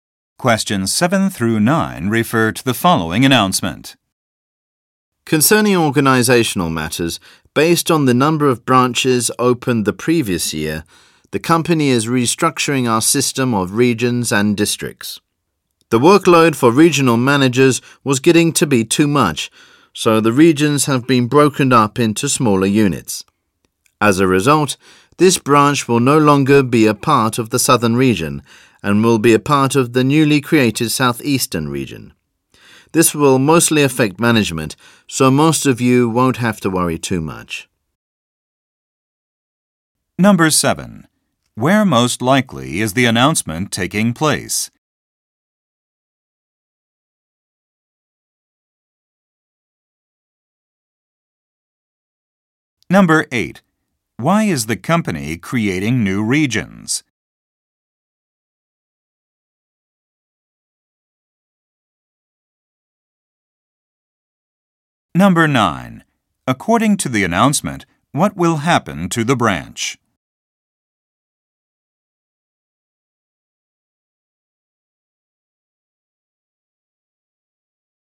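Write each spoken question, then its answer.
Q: Why is the company creating new regions?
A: Regional managers' workload was too much

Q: According to the announcement, what will happen to the branch?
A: It will become part of the new southeastern region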